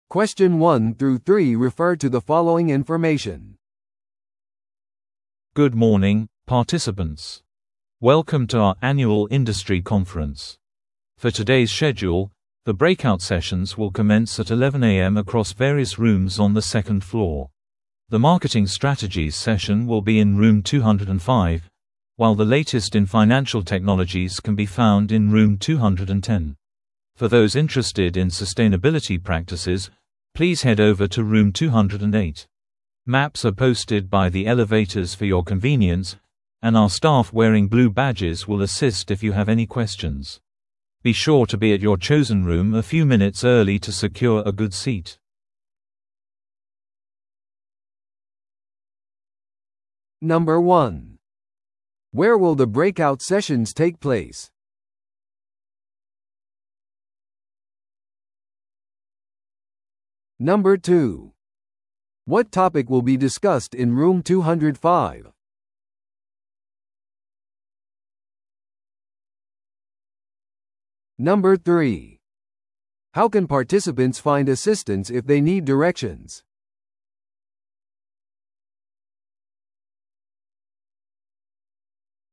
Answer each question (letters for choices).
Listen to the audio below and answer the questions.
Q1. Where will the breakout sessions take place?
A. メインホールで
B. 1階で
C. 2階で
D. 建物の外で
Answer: C

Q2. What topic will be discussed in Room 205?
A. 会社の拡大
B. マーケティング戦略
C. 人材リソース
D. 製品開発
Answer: B

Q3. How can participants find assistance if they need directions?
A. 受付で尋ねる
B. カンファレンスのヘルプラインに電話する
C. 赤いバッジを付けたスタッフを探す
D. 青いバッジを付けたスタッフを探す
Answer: D

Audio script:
Good morning, participants! Welcome to our annual industry conference. For today's schedule, the breakout sessions will commence at 11am across various rooms on the second floor. The Marketing Strategies session will be in Room 205, while the latest in Financial Technologies can be found in Room 210. For those interested in Sustainability Practices, please head over to Room 208. Maps are posted by the elevators for your convenience, and our staff wearing blue badges will assist if you have any questions. Be sure to be at your chosen room a few minutes early to secure a good seat!